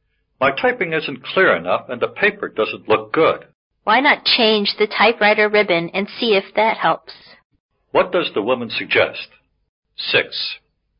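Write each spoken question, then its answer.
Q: What does the woman suggest?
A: Change the typewriter ribbon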